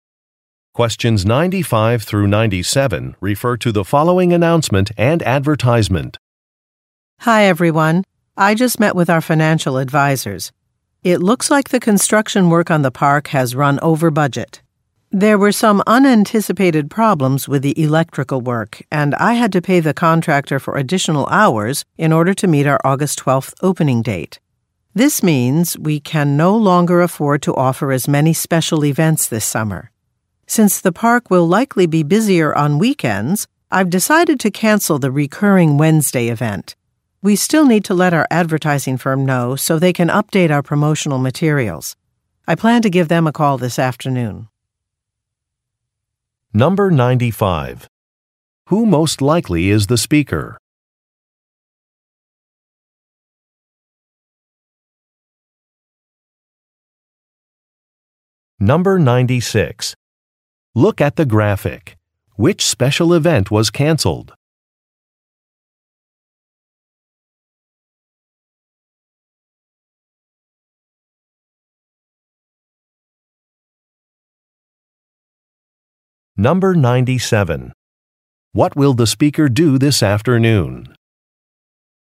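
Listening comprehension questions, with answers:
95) Who most likely is the speaker?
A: A park owner

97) What will the speaker do this afternoon?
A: Make a phone call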